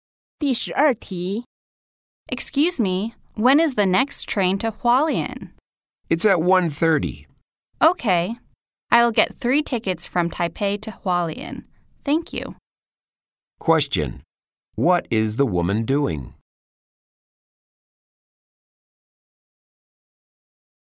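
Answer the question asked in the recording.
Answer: Buying train tickets from Taipei to Hualien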